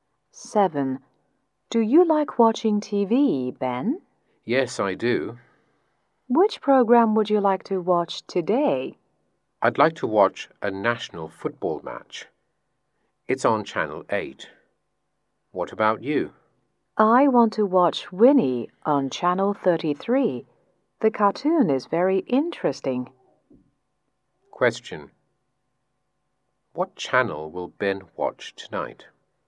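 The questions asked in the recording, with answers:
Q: What channel will Ben watch tonight?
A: Channel 8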